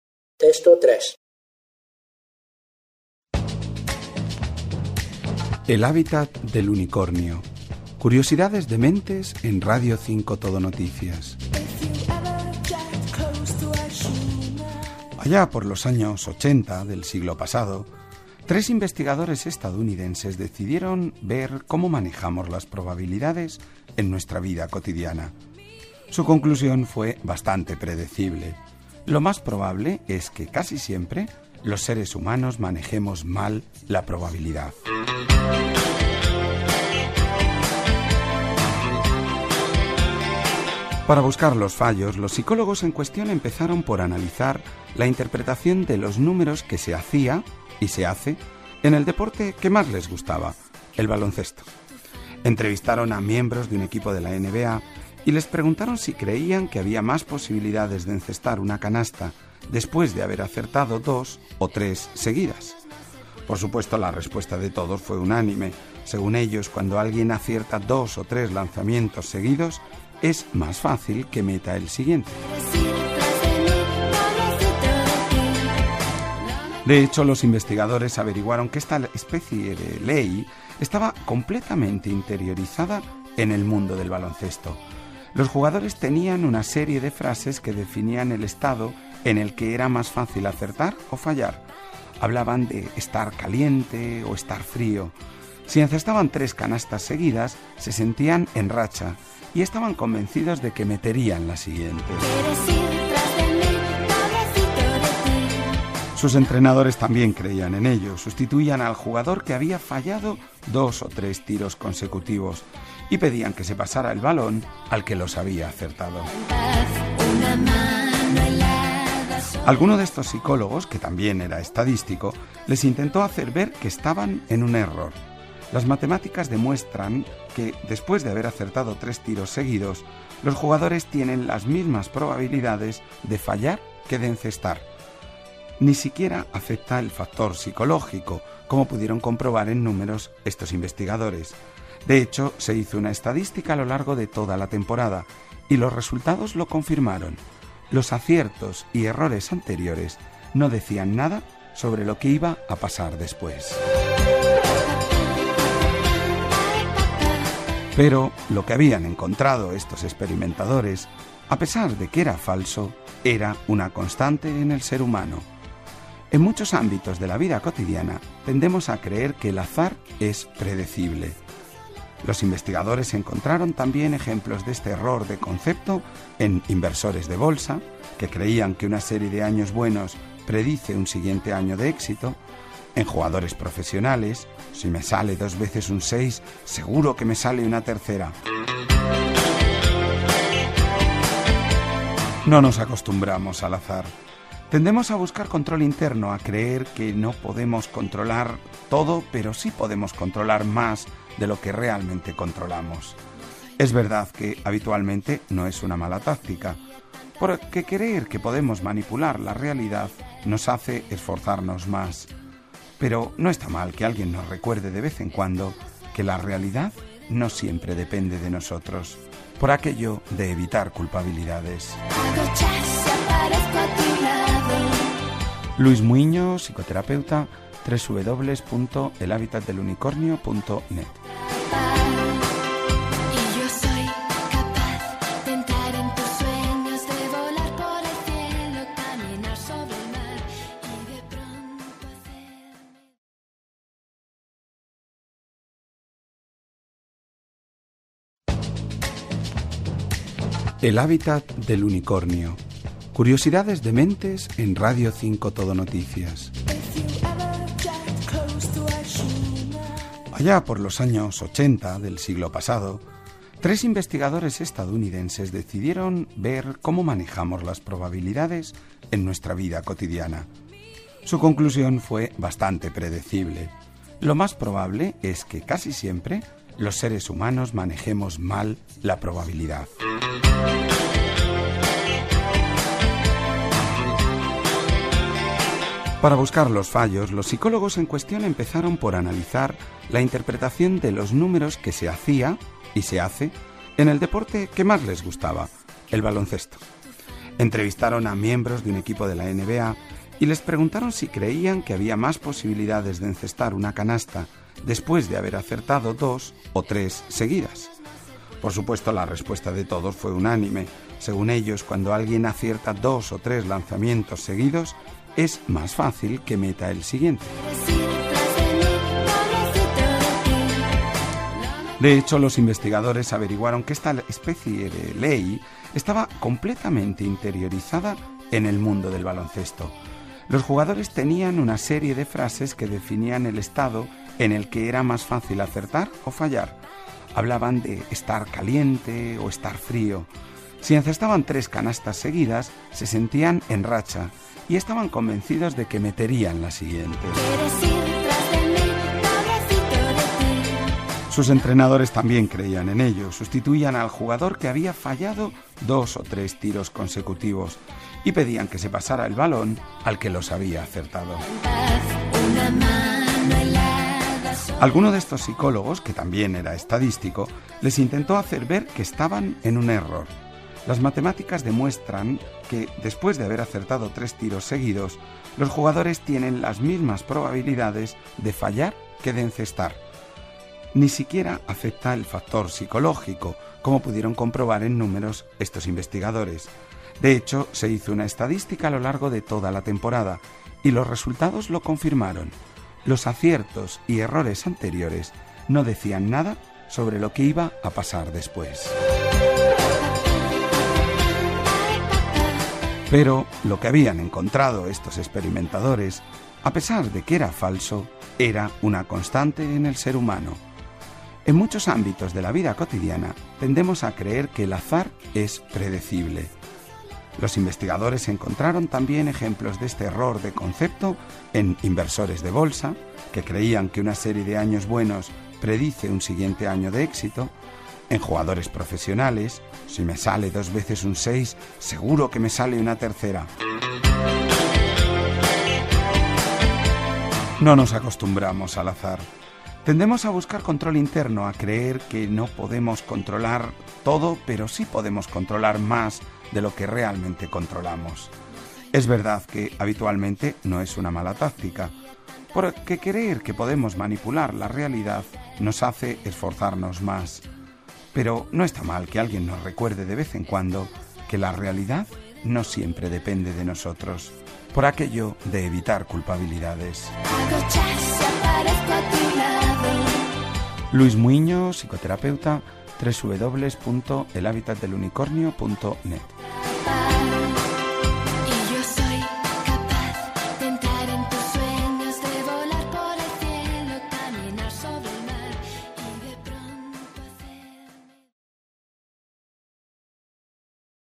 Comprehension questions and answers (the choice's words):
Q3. Los científicos han descubierto que los jugadores ______.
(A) están en buen estado de ánimo tras encestar tres canastas seguidas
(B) tienden a acertar más tiros en aquellas temporadas de calor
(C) encestan más canastas tras hacer cálculos correctos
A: están en buen estado de ánimo tras encestar tres canastas seguidas

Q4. Hay ejemplos que demuestran que ______.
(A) eran falsos los experimentos de los psicólogos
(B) el azar no tenía importancia para los profesionales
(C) mucha gente suele creer en el efecto del azar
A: mucha gente suele creer en el efecto del azar

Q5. Los investigadores han llegado a la conclusión de que ______.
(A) nadie puede controlar el azar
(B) quien controla el azar controla más de lo que realmente pensamos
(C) quien controla el azar se controla a sí mismo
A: nadie puede controlar el azar

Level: 专业八级